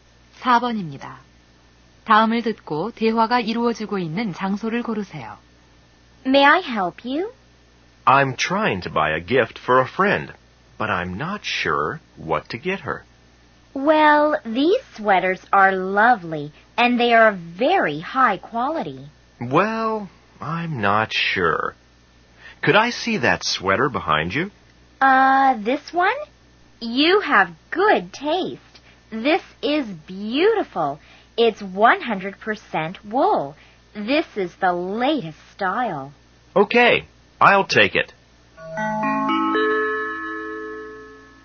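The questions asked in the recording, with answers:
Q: 다음을 듣고 대화가 이루어지고 있는 장소를 고르세요.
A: 옷 가게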